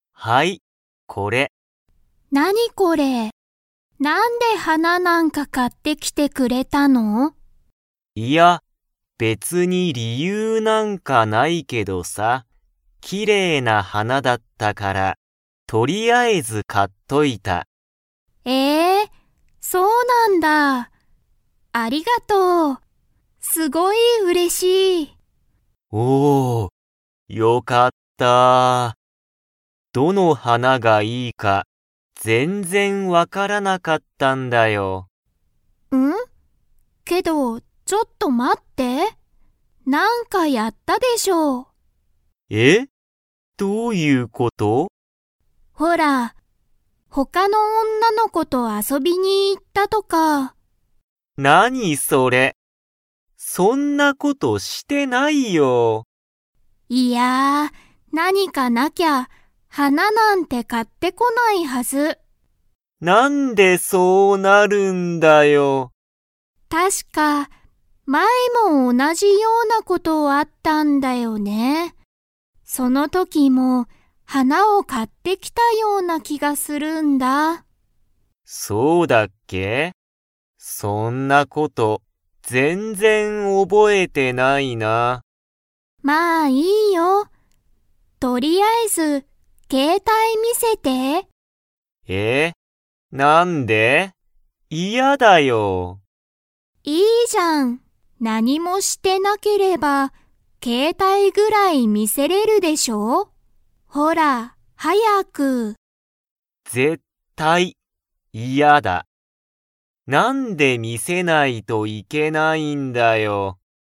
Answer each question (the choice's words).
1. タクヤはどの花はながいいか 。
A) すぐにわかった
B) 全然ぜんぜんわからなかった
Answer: 全然ぜんぜんわからなかった

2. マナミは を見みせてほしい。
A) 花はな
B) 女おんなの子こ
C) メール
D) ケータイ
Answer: ケータイ

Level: Level 3